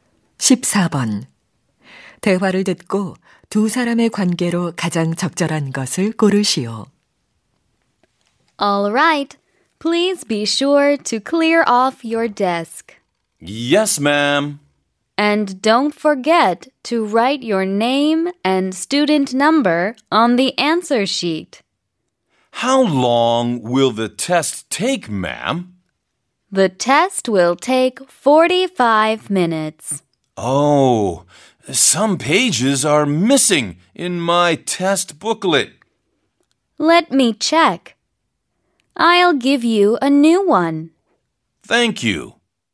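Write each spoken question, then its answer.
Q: 대화를 듣고 두 사람의 관계로 가장 적절한 것을 고르시오.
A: 시험 감독 교사와 학생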